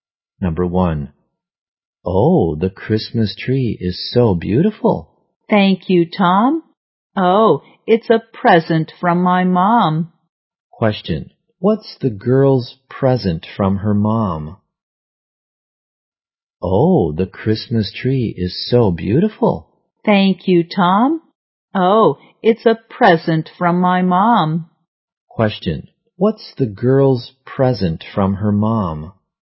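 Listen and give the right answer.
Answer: A Christmas tree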